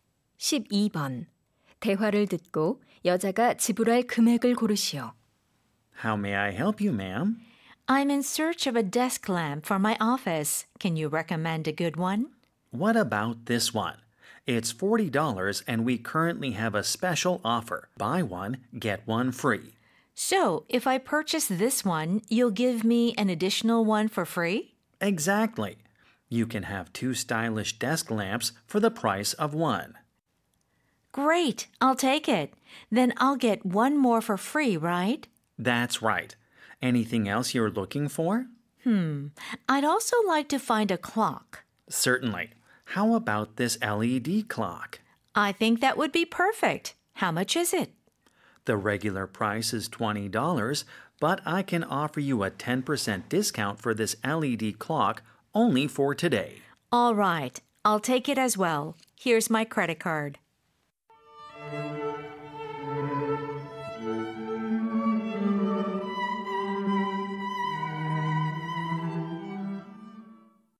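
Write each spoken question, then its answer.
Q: 대화를 듣고 여자가 지불할 금액을 고르시오.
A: $58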